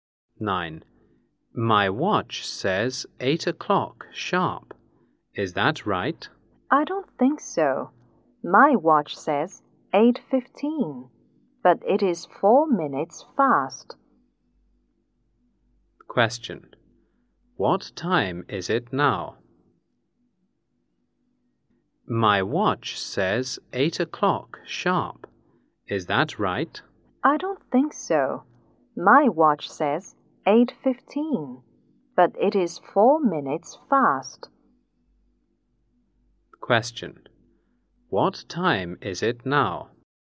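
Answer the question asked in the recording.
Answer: 8:11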